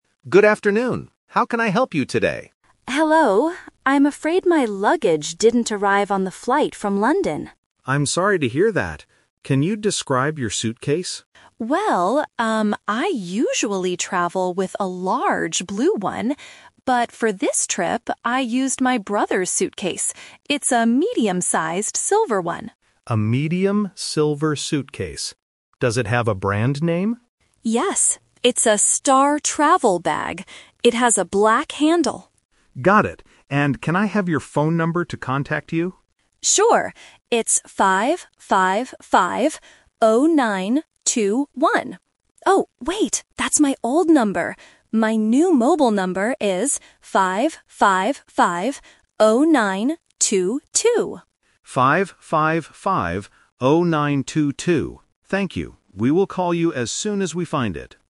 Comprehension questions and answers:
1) What does the passenger's suitcase look like?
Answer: It is medium and silver.

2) What is the brand of the suitcase?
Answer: Star-Travel.

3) What is the passenger's current phone number?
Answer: 555-0922.

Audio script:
Staff: Good afternoon. How can I help you today?
Passenger: Hello. I'm afraid my luggage didn't arrive on the flight from London.
Staff: I'm sorry to hear that. Can you describe your suitcase?
Passenger: Well, um, I usually travel with a large blue one. But for this trip, I used my brother's suitcase. It's a medium-sized silver one.
Staff: A medium silver suitcase. Does it have a brand name?
Passenger: Yes, it's a "Star-Travel" bag. It has a black handle.
Staff: Got it. And can I have your phone number to contact you?
Passenger: Sure. It's 555-0921. Oh, wait! That's my old number. My new mobile number is 555-0922.